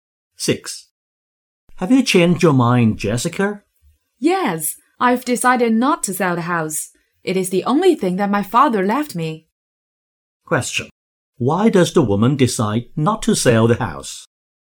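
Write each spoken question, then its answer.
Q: Why does the woman decide not to sell the house?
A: It is the only thing her father left her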